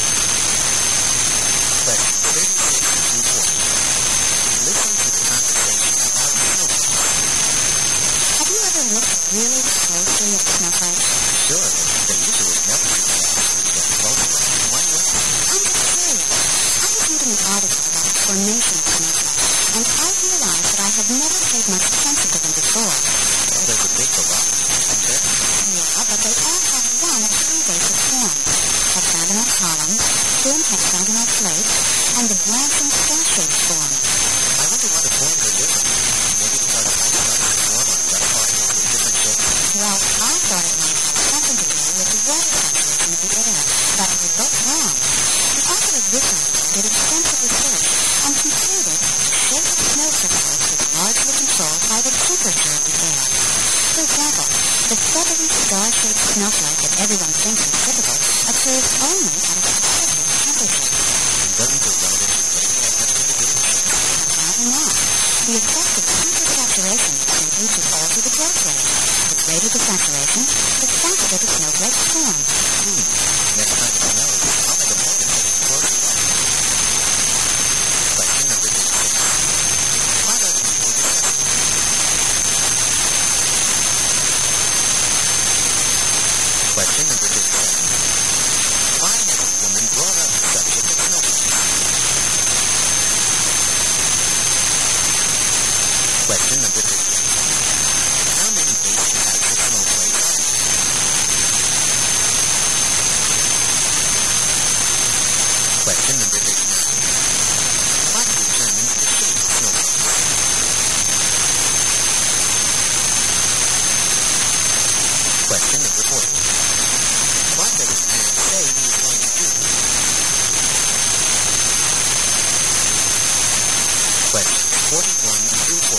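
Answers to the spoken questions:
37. She read an article about how snowflakes form
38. Three
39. The temperature of the air
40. Look more closely at snowflakes next time it snows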